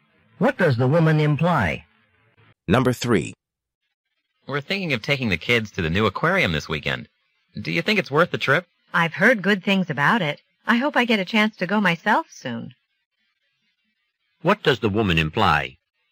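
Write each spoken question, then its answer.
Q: What does the woman imply?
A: She hasn't been to the aquarium yet, but it's probably worth going.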